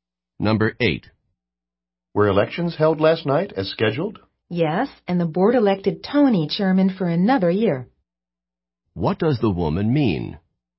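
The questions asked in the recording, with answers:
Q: What does the woman mean?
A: Yes, Tony was re-elected chairman for another year.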